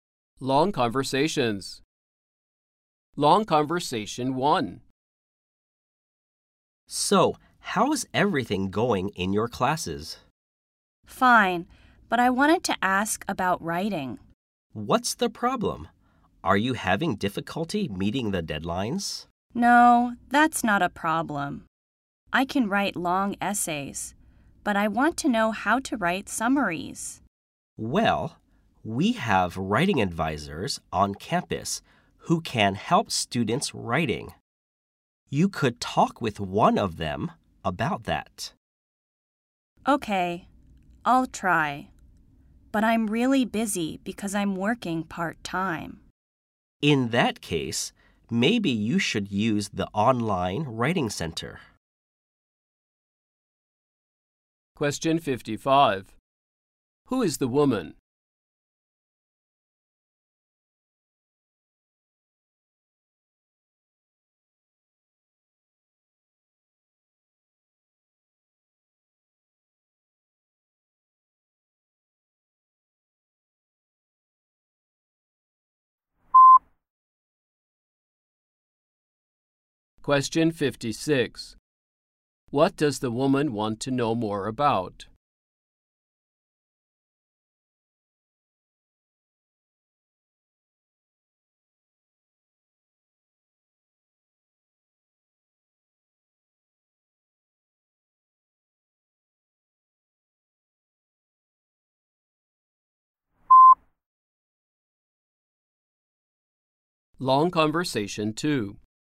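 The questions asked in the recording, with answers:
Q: What does the woman want to know more about?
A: How to write summaries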